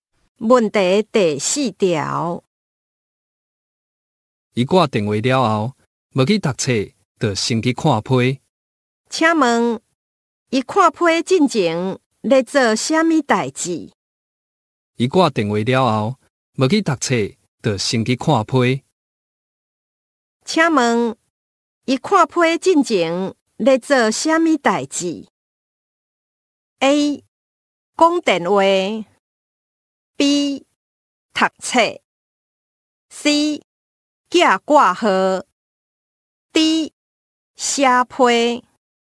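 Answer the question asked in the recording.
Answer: A: 讲电话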